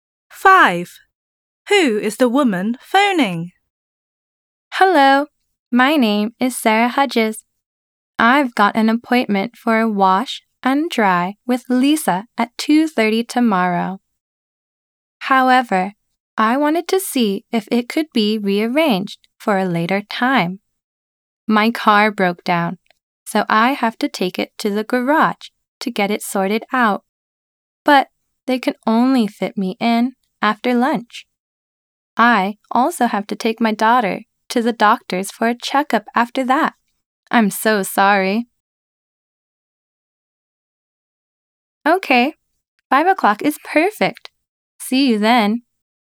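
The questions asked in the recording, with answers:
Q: Who is the woman phoning?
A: The hairdresser's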